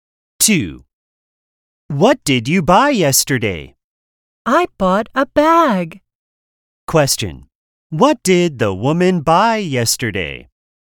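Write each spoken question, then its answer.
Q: What did the woman buy yesterday?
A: A bag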